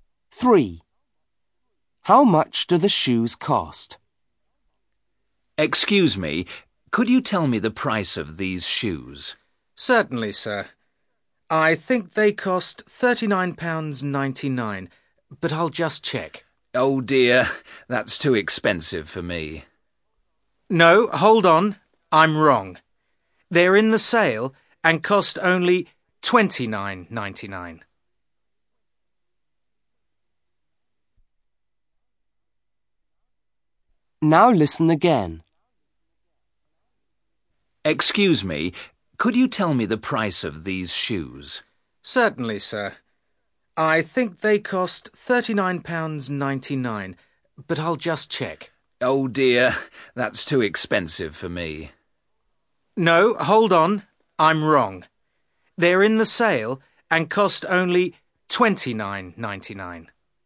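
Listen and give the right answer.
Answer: £29.99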